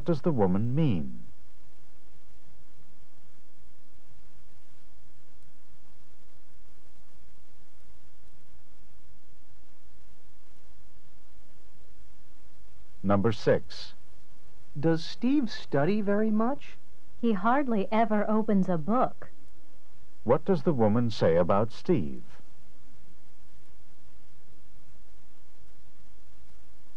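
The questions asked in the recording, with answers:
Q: What does the woman say about Steve?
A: He almost never studies.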